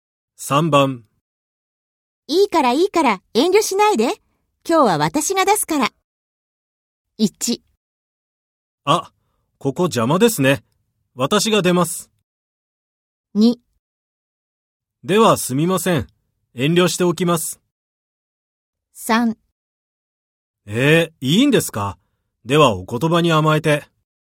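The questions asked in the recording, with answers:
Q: いいからいいから遠慮しないで。今日は私が出すから。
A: 3: いいんですか。ではお言葉に甘えて。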